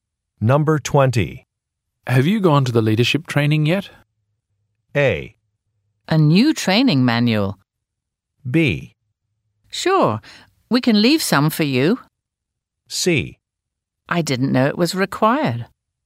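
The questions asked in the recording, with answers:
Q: Have you gone to the leadership training yet?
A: C: I didn't know it was required.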